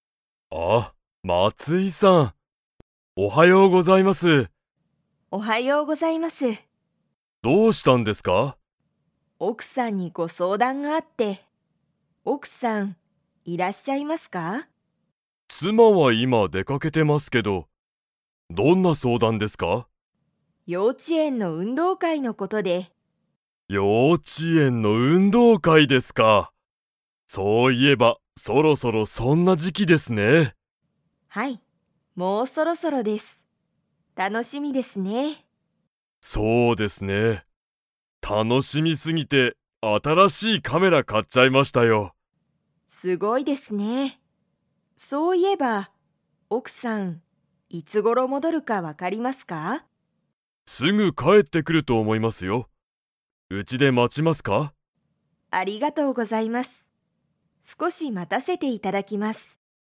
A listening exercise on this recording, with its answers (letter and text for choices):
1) 大西(おおにし)さんの奥(おく)さんは今(いま)、 。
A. 家(いえ)にいる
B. 家(いえ)にいない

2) 大西(おおにし)さんは、何(なに)を買(か)いましたか?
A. ご飯(はん)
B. カメラ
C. 写真(しゃしん)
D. テレビ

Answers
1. B. 家(いえ)にいない
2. B. カメラ

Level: Level 4